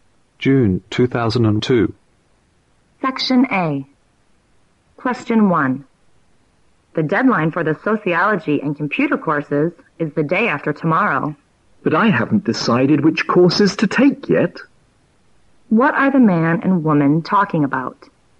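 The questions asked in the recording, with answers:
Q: What are the man and woman talking about?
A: Which courses to choose before the deadline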